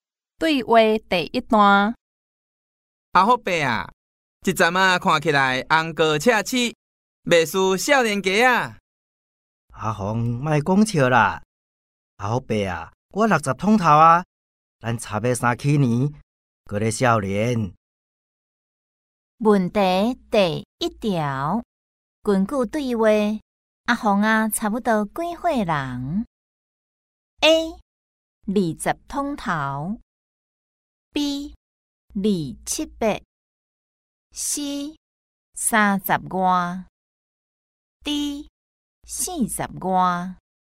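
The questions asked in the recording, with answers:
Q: 根据对话,阿宏啊,差不多几岁人 ?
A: A: 20通头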